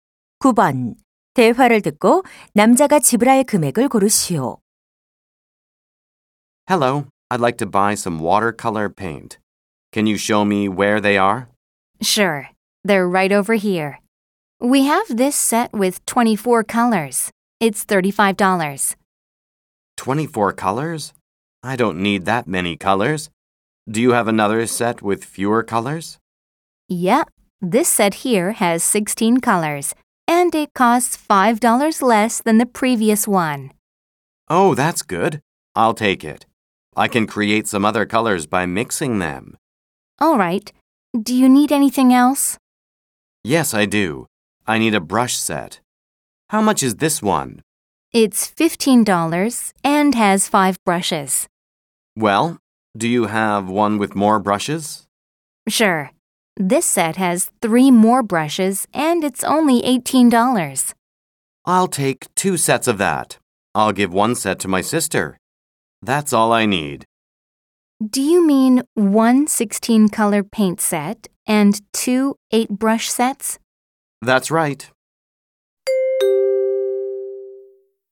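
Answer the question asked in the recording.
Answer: $66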